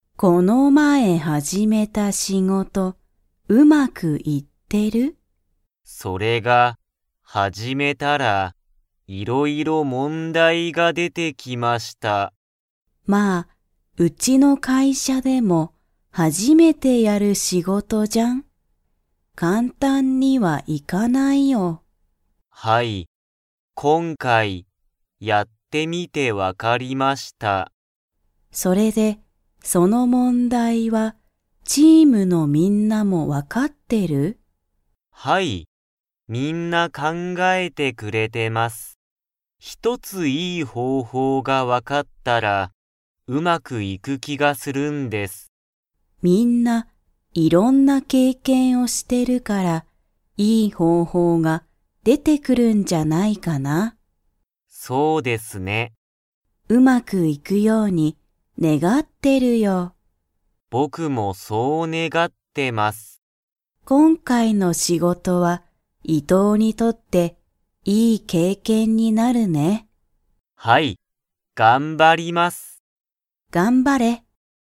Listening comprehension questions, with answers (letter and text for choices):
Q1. この前(まえ)伊藤(いとう)さんが始(はじ)めた仕事(しごと)は、いろいろ問題(もんだい)が出(で)ましたか?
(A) はい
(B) いいえ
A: (A) はい

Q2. 今回(こんかい)の仕事(しごと)は、伊藤(いとう)さんにとっていい____になる。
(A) 経験(けいけん)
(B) 問題(もんだい)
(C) 会社(かいしゃ)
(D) 世界(せかい)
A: (A) 経験(けいけん)

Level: Level 2